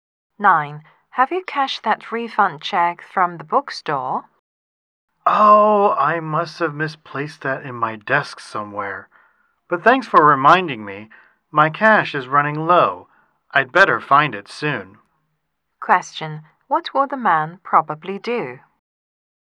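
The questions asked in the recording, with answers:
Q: What will the man probably do?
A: Look for the refund check in his desk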